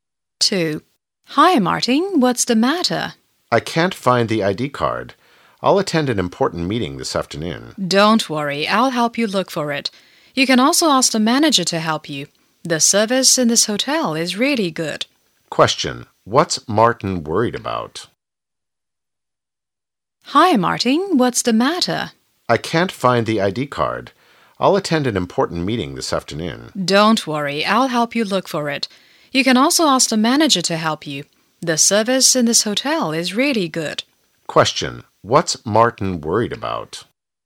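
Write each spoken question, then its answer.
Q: Question. What's Martin worried about?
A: He can't find his ID card.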